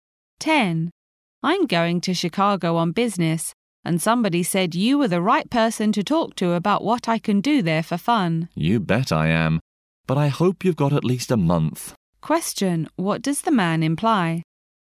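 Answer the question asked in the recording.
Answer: There are lots of fun things to do in Chicago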